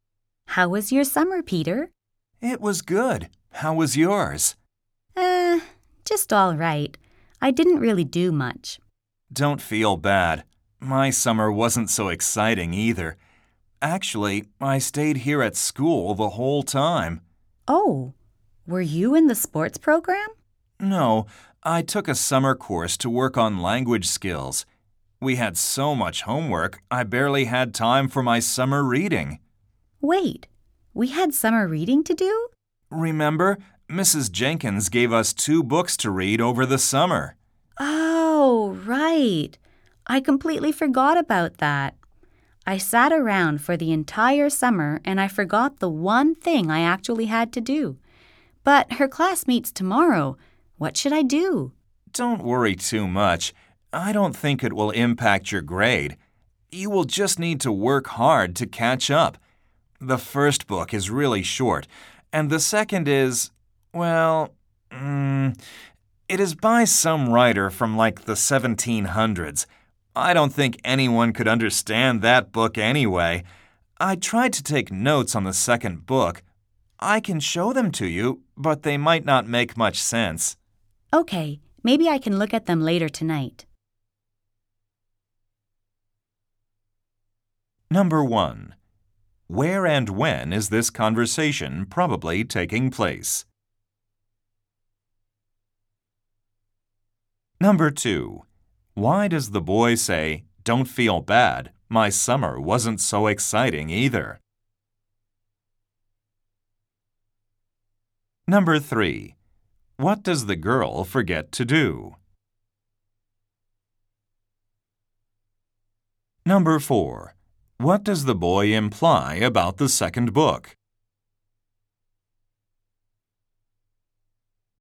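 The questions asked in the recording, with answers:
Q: Where and when is this conversation probably taking place?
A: At school, at the start of the school year (after summer)

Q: Why does the boy say, "Don't feel bad, my summer wasn't so exciting either"?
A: To comfort the girl, who said she didn't do much

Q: What does the girl forget to do?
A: Her summer reading (the two books for Mrs. Jenkins)

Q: What does the boy imply about the second book?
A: It is very hard to understand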